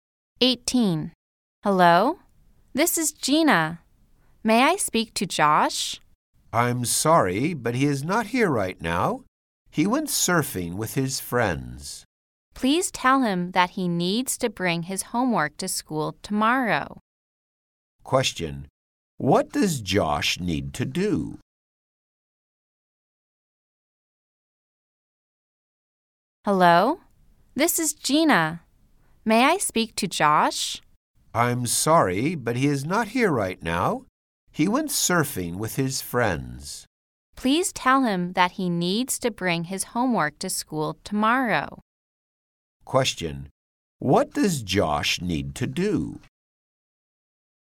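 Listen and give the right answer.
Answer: Bring his homework to school tomorrow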